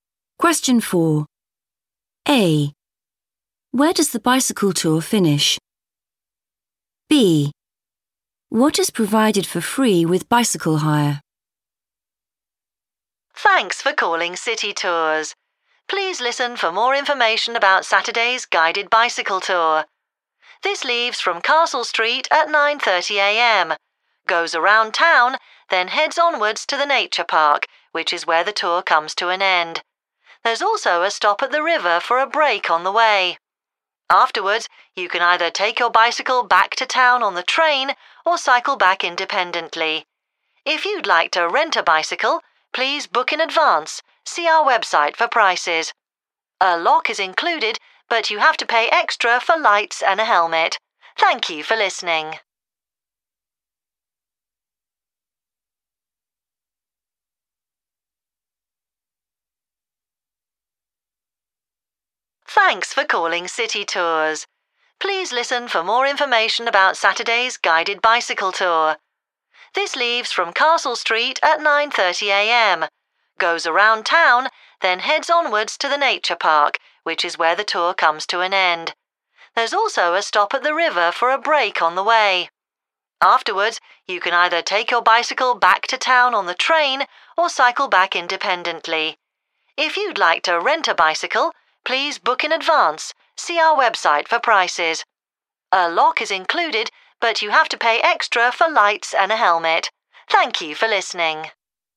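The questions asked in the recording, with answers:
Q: Where does the bicycle tour finish?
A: at the Nature Park

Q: What is provided for free with bicycle hire?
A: a lock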